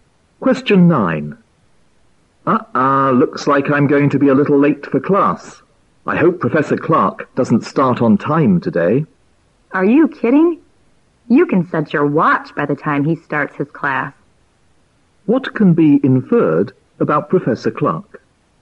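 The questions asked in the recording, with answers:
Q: What can be inferred about Professor Clark?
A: He always starts his class on time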